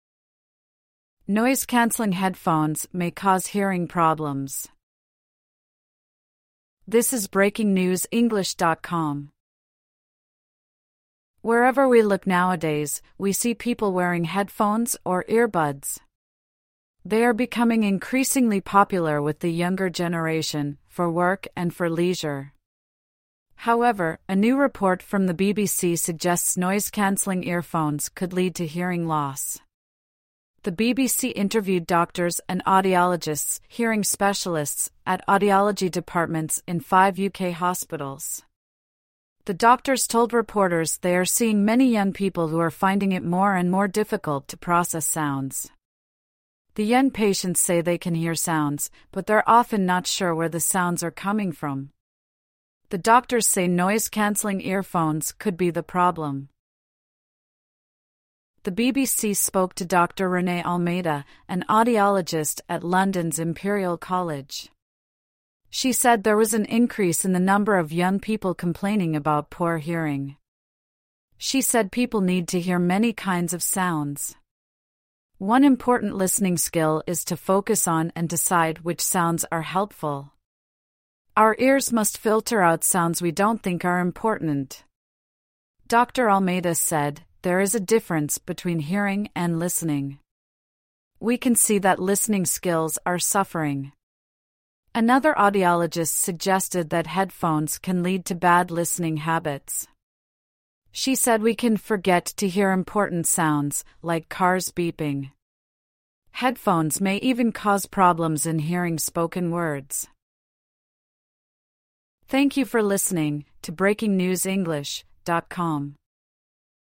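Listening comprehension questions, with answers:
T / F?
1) The article says everyone wears headphones and earbuds.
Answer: F

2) Headphones are becoming more popular with older people.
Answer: F

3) The BBC interviewed doctors who were experts in hearing.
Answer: T

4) Some young people don't know where the sounds they hear come from.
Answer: T

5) More and more older people are complaining about hearing problems.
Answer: F

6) A doctor said people need to hear different kinds of sounds.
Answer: T

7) The doctor said hearing and listening are the same.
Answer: F

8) The doctor said headphone use could make people forget some sounds.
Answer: T

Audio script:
Noise-cancelling headphones may cause hearing problems
Apple AirPodsWherever we look nowadays, we see people wearing headphones or earbuds. They are becoming increasingly popular with the younger generation, for work and for leisure. 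However, a new report from the BBC suggests noise-cancelling earphones could lead to hearing loss. The BBC interviewed doctors and audiologists (hearing specialists) at audiology departments in five UK hospitals. The doctors told reporters they are seeing many young people who are finding it more and more difficult to process sounds. The young patients say they can hear sounds, but they're often not sure where the sounds are coming from. The doctors say noise-cancelling earphones could be the problem.
The BBC spoke to Dr Renee Almeida, an audiologist at London's Imperial College. She said there was an increase in the number of young people complaining about poor hearing. She said people need to hear many kinds of sounds. One important listening skill is to focus on and decide which sounds are helpful. Our ears must filter out sounds we don't think are important. Dr Almeida said: "There is a difference between hearing and listening. 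We can see that listening skills are suffering." Another audiologist suggested that headphones can lead to bad listening habits. She said we can "forget" to hear important sounds, like cars beeping. Headphones may even cause problems in hearing spoken words.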